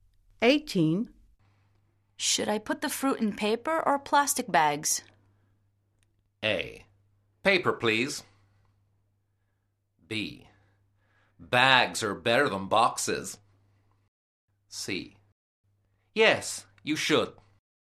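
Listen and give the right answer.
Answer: A: Paper, please.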